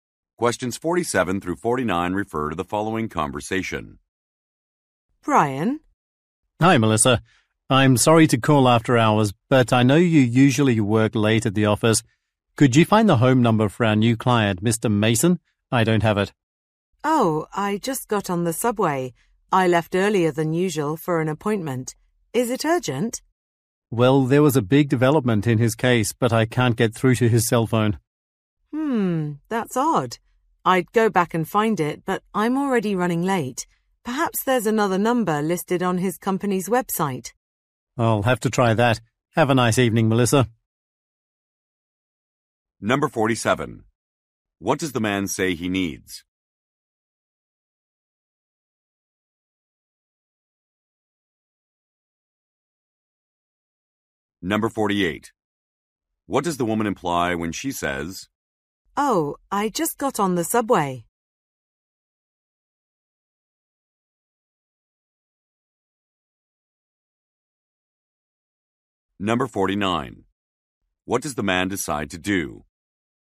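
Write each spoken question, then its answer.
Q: What does the man say he needs?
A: A client's home phone number

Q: What does the woman imply when she says,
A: She is not at the office and cannot look up the number

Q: What does the man decide to do?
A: Check the client's company website for another number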